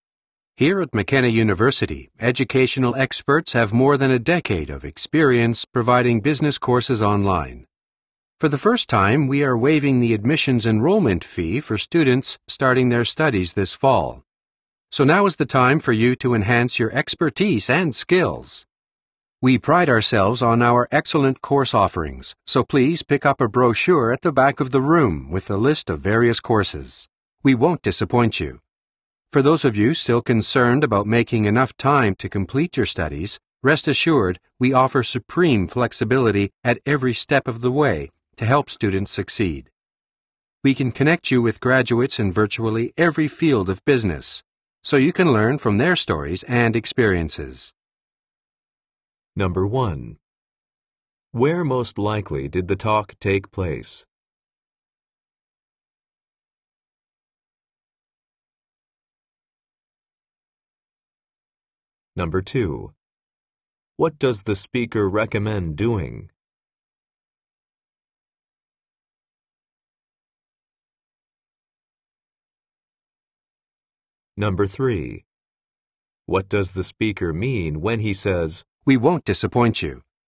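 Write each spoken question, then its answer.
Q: What does the speaker recommend doing?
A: Picking up a brochure at the back of the room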